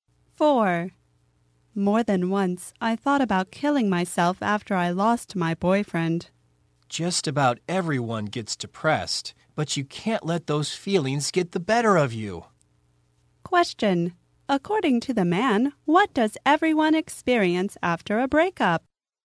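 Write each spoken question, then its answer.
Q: According to the man, what does everyone experience after a breakup?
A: Depression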